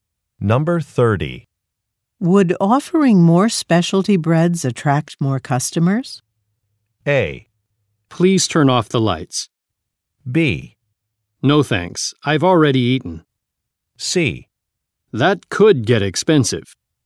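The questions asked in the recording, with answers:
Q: Would offering more specialty breads attract more customers?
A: C: That could get expensive.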